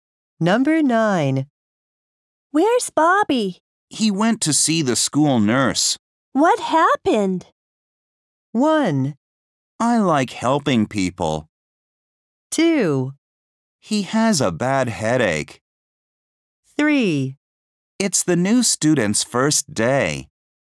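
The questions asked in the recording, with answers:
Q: What happened?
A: 2: He has a bad headache.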